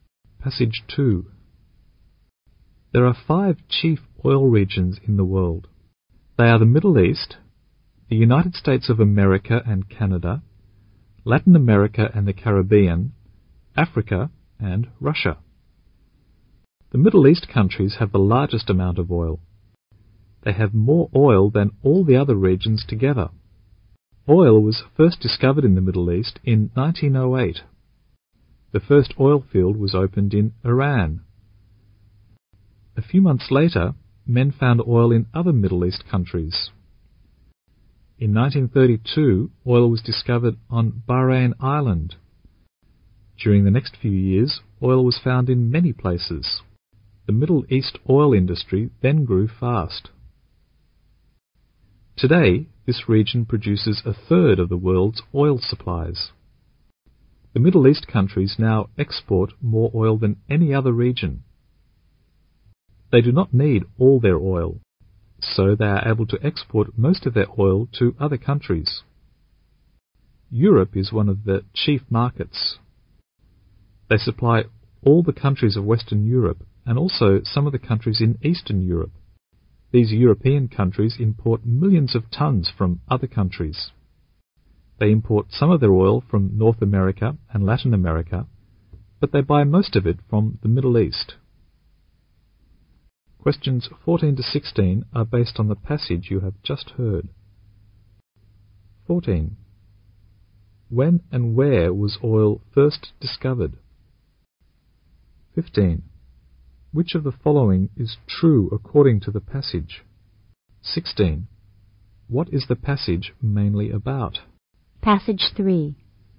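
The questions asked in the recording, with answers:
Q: When and where was oil first discovered?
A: In 1908, in Iran (in the Middle East)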